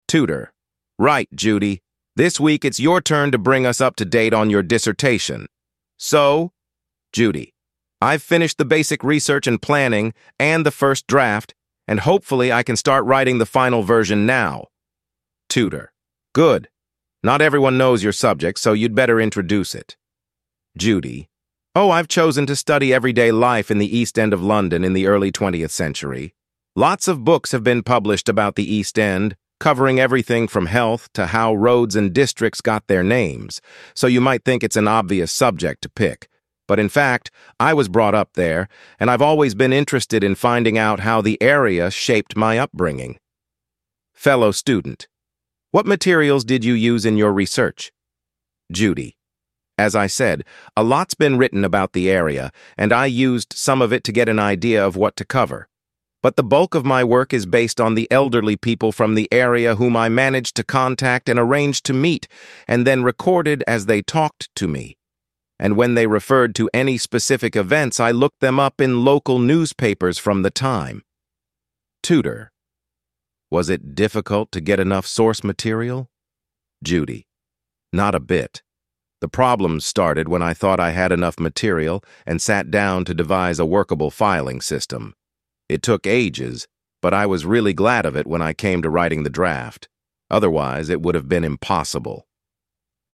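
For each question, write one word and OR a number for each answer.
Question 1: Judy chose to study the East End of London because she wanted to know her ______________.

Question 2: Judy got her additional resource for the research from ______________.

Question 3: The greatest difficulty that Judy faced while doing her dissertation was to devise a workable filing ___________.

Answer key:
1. upbringing
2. newspapers
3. system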